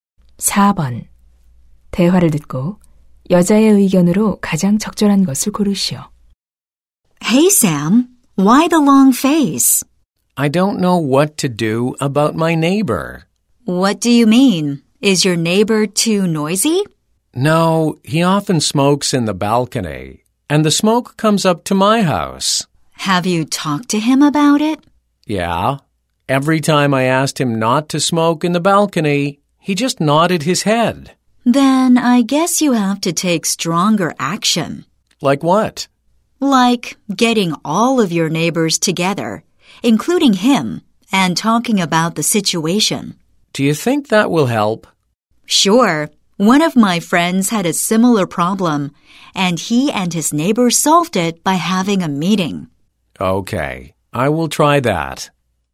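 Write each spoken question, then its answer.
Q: 대화를 듣고 여자의 의견으로 가장 적절한 것을 고르시오.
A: 이웃들과 모임을 열어 문제를 논의해야 한다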